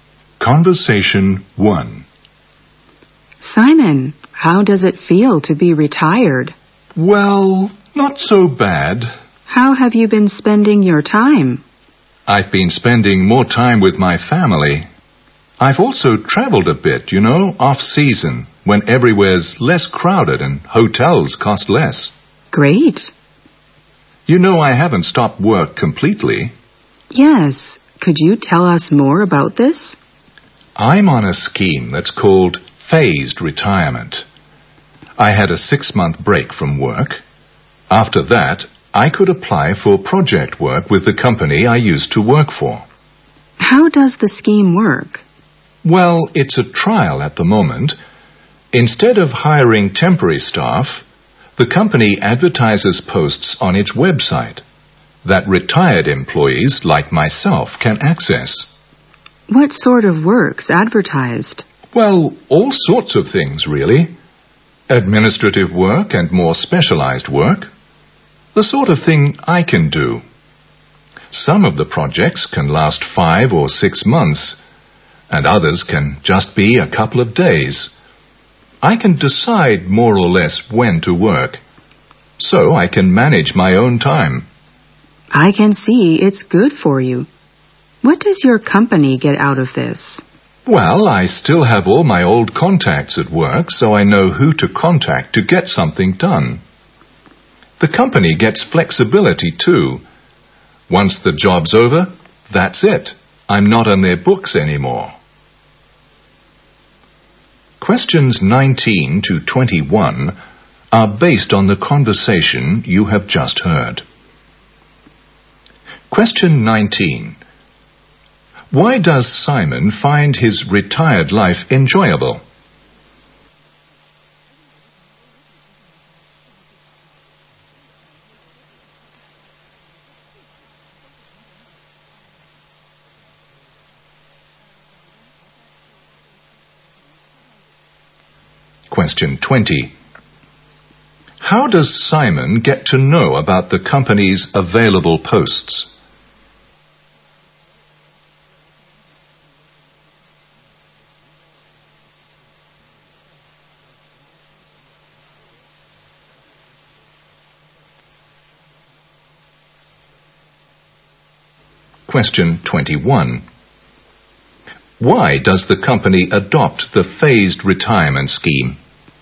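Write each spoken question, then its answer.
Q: How does Simon get to know about the company's available posts?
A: From the company's website

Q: Why does the company adopt the phased retirement scheme?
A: For flexibility, instead of hiring temporary staff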